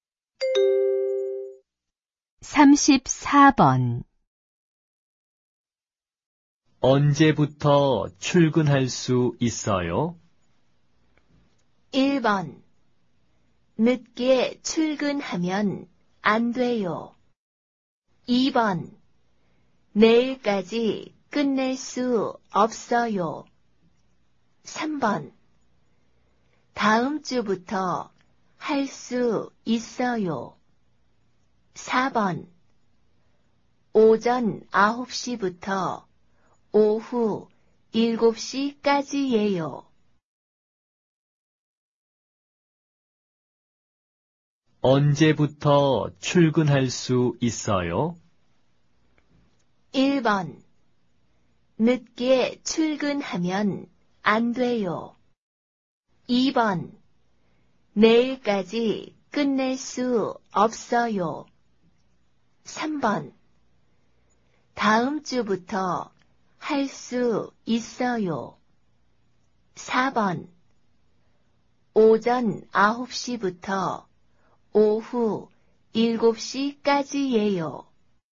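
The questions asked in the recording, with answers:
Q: 언제부터 출근할 수 있어요?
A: 3: 다음 주부터 할 수 있어요.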